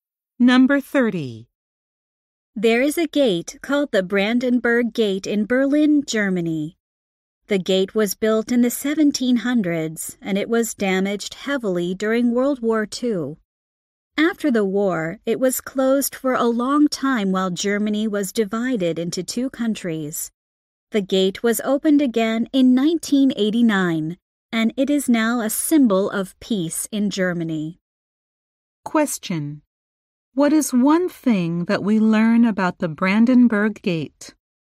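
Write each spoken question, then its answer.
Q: What is one thing that we learn about the Brandenburg Gate?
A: It was reopened in 1989 and is now a symbol of peace.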